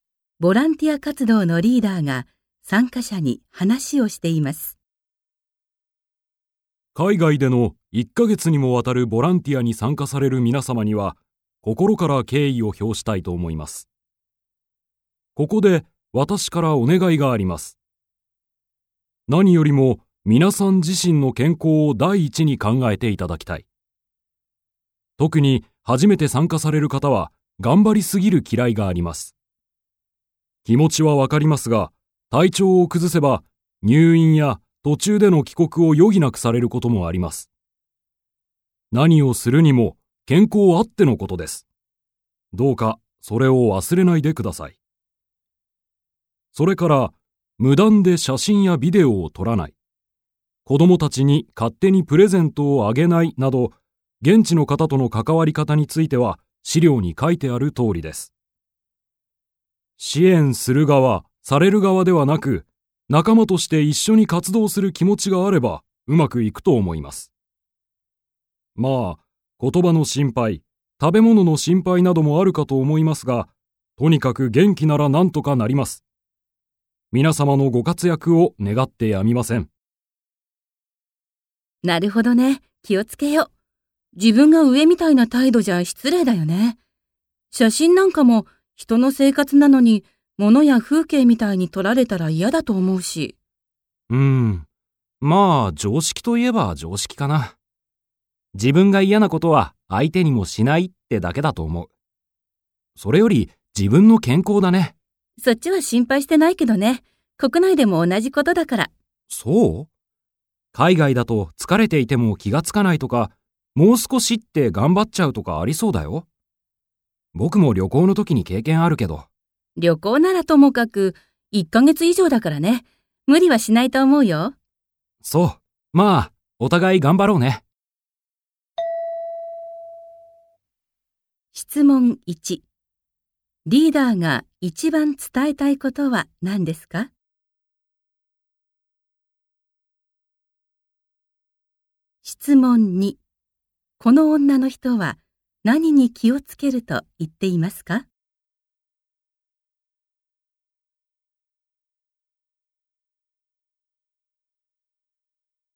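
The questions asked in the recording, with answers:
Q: リーダーが一番伝えたいことは何ですか?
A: 自分の健康を第一に考えること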